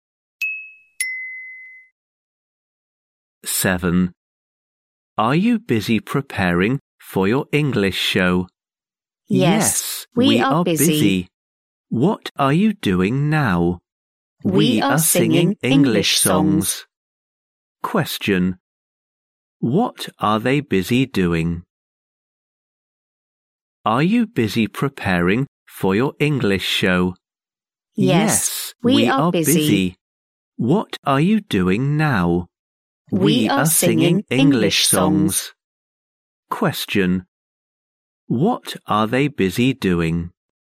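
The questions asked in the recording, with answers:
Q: What are they busy doing?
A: Singing English songs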